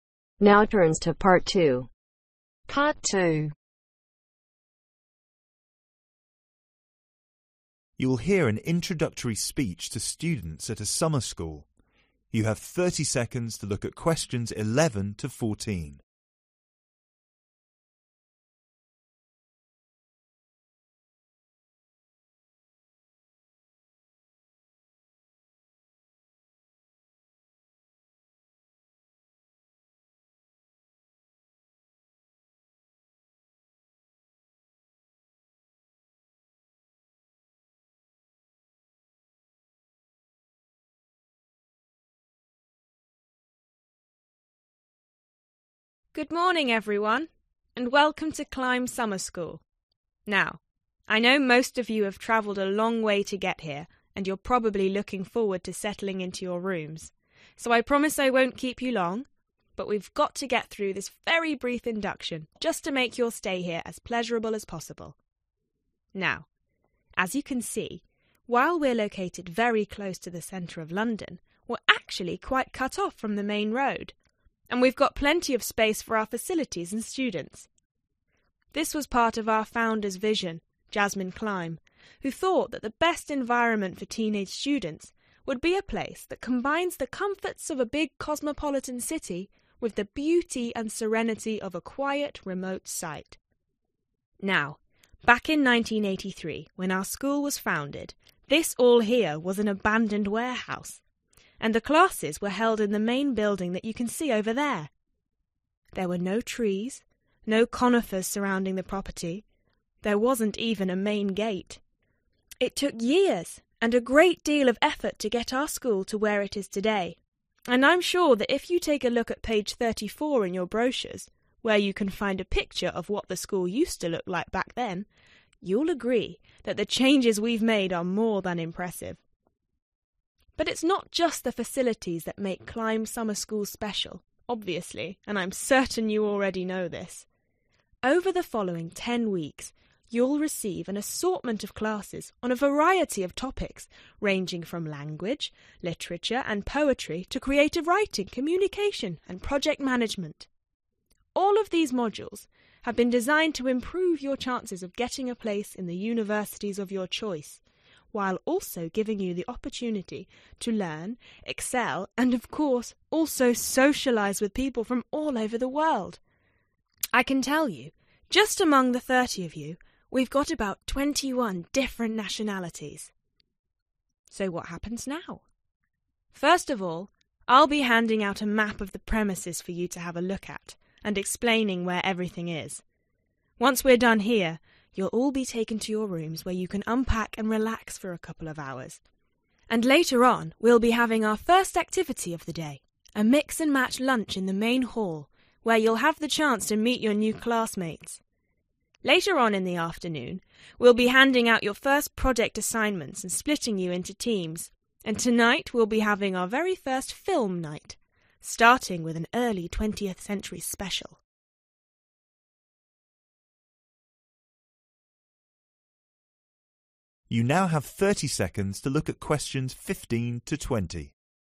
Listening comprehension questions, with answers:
Complete the sentences below. Write NO MORE THAN TWO WORDS for each answer.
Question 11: Jasmine Climb founded her school on a quiet and isolated site because she appreciated the ............. and serenity of such places.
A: beauty

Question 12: When the school was first found , it had neither trees nor a .............. .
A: main gate

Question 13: The students listening to the speech will be staying at the school for ............. .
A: ten weeks

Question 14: The program for the students' first day will culminate with a ............. .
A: film night